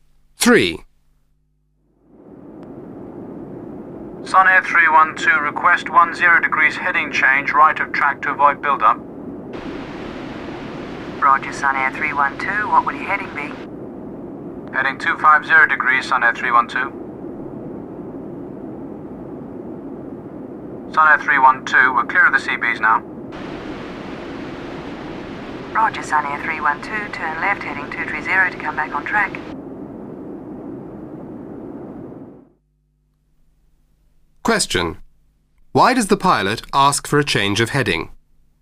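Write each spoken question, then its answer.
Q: Why does the pilot ask for a change of heading?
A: To avoid a weather build-up (CBs)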